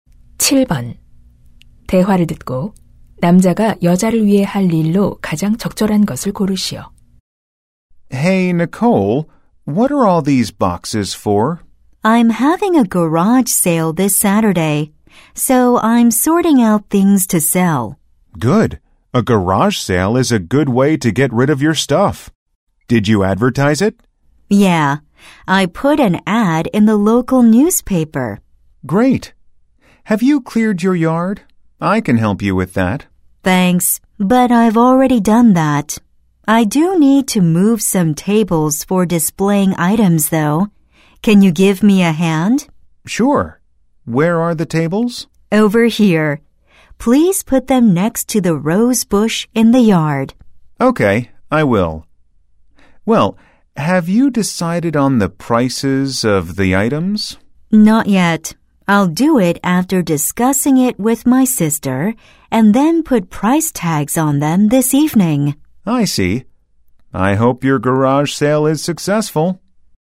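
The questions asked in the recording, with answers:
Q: 대화를 듣고 남자가 여자를 위해 할 일로 가장 적절한 것을 고르시오.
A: 탁자 옮기기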